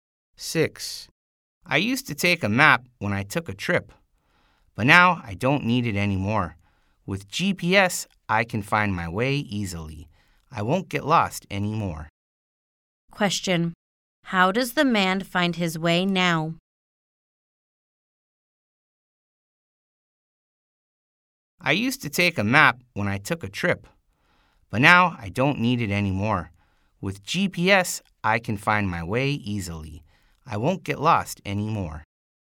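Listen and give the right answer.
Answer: With GPS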